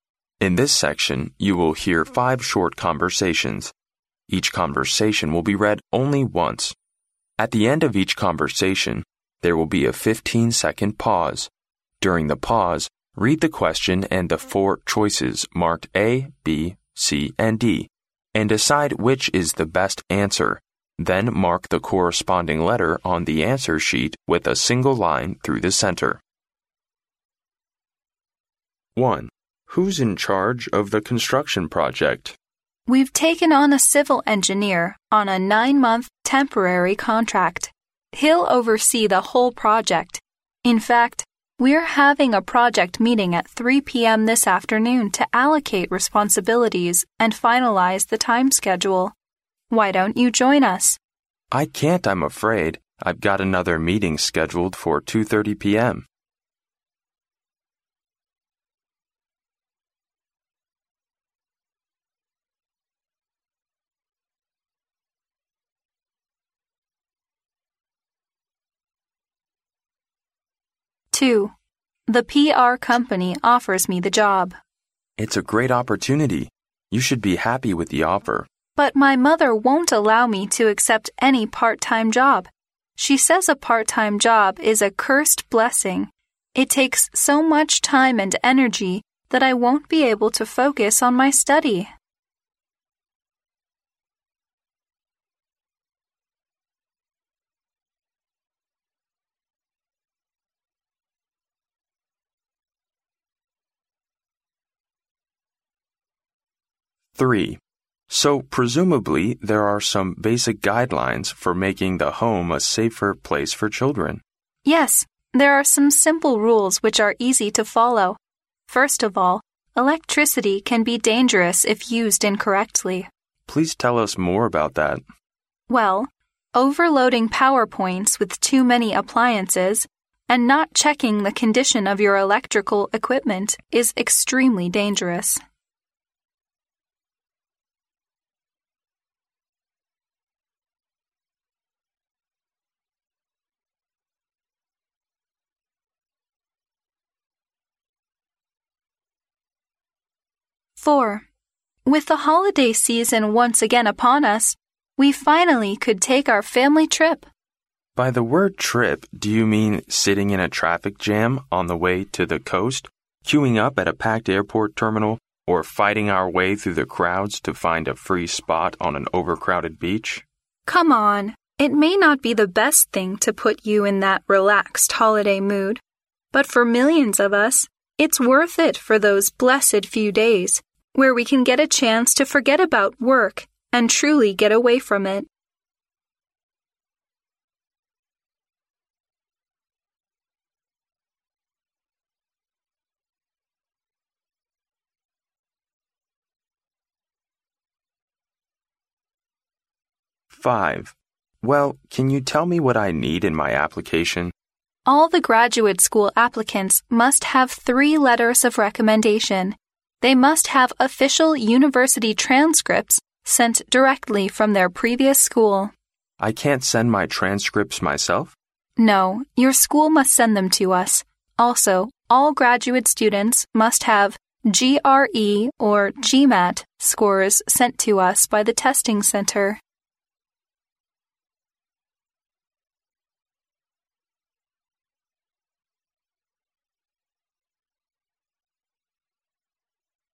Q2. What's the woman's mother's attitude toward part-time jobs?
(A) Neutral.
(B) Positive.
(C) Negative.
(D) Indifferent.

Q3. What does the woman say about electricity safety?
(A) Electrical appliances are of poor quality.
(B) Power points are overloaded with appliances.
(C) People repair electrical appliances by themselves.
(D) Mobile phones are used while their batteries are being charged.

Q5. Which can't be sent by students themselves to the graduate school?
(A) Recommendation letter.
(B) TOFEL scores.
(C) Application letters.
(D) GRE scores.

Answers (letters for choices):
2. C
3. B
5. D

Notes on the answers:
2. 录音中女士说她的妈妈不允许她做兼职,因为兼职需要花费很多时间和精力,导致她不能专心学习。因此可以看出女士的妈妈对女士做兼职一事持否定态度。C项正确。
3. 录音中女士说到overloading power points with too many appliances...is extremely dangerous,也就是说电源插座上不能插太多电器。B项意思正确。A、C、D三项内容录音未提及。